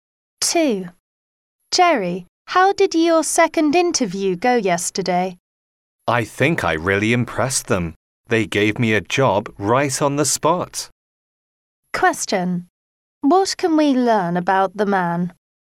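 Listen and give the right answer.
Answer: He got the job at the interview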